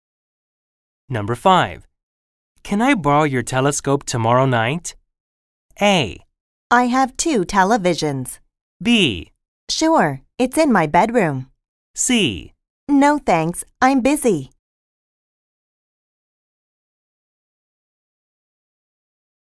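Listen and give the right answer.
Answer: B: Sure, it's in my bedroom.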